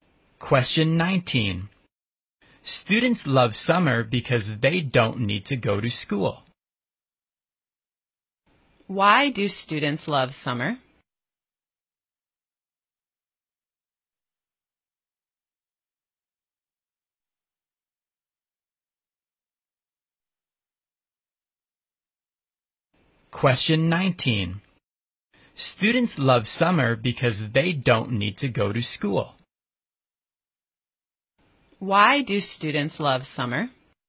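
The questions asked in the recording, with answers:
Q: Why do students love summer?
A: Because they don't need to go to school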